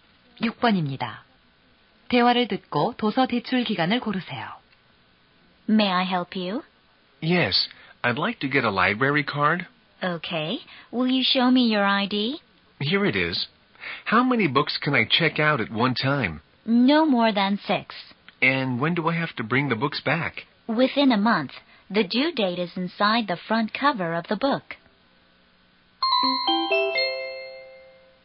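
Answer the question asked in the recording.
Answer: 한 달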